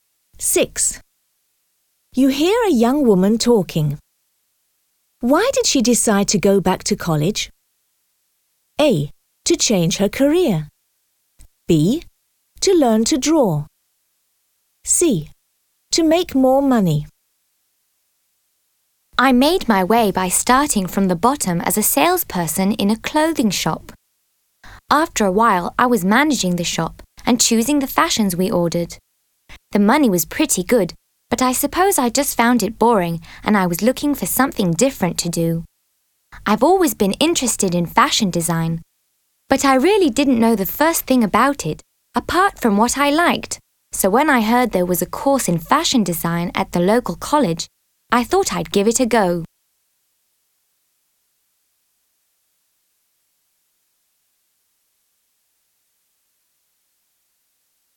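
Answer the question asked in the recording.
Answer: A: To change her career.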